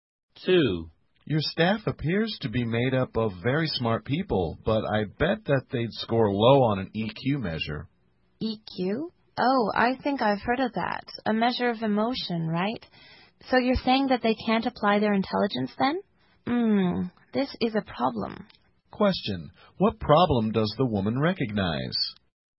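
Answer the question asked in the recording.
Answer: Her staff are smart but can't apply their intelligence (low EQ)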